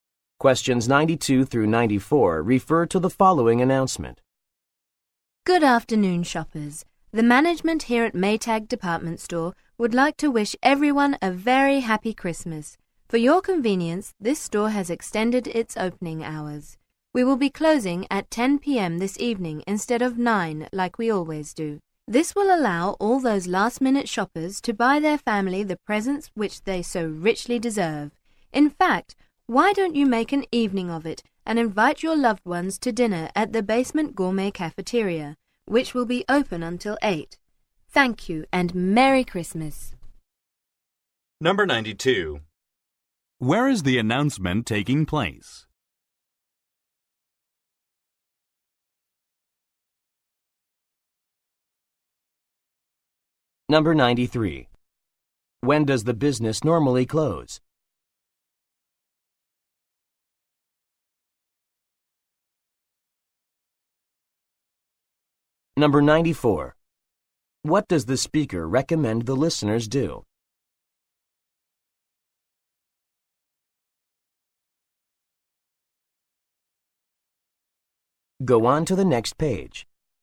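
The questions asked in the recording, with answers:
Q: Where is the announcement taking place?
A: In a department store

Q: When does the business normally close?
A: At 9 p.m.

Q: What does the speaker recommend the listeners do?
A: Have dinner at the Basement Gourmet Cafeteria with their family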